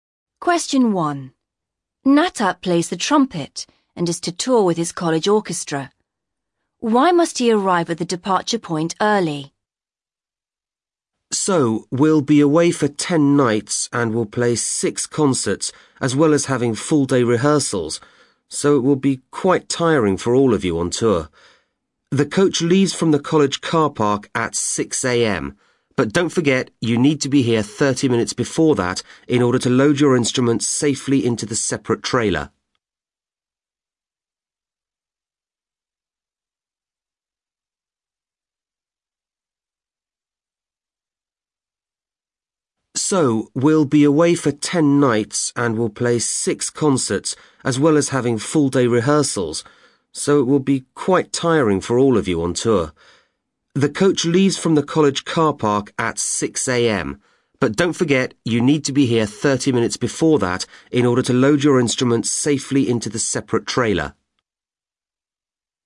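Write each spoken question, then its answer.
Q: Why must he arrive at the departure point early?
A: To load his instruments safely into the separate trailer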